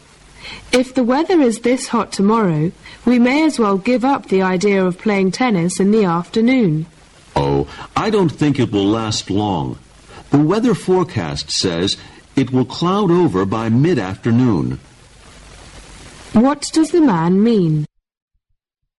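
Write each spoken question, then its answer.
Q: What does the man mean?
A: They will probably be able to play tennis tomorrow afternoon

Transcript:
[听力原文] W: If the weather is this hot tomorrow, we may as well give up the idea of playing tennis in the afternoon. M: Oh, I don't think it'll last long. The weather forecast says it will cloud over by mid-afternoon Q: What does the man mean?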